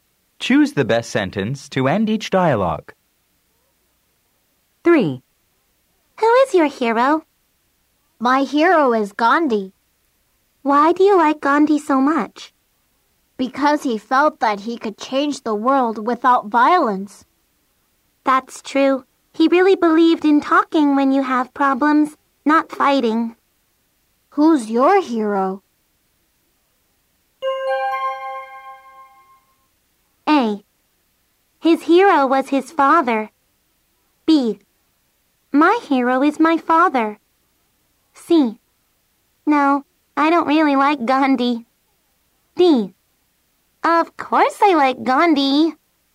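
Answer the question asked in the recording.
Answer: B: My hero is my father.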